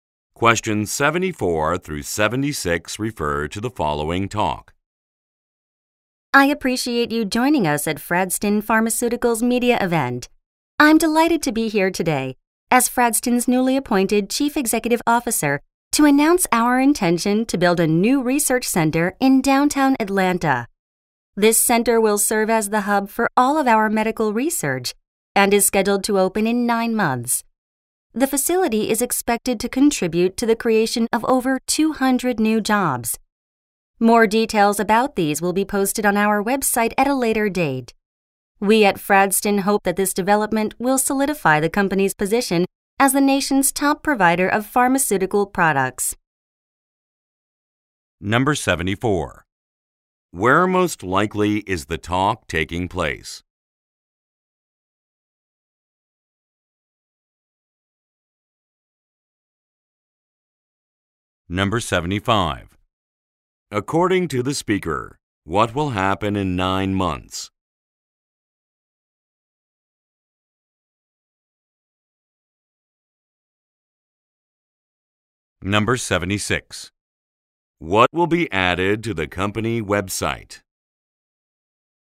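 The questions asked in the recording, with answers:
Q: Where most likely is the talk taking place?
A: At a media event

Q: According to the speaker, what will happen in 9 months?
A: A research center will open

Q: What will be added to the company website?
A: Details about the new jobs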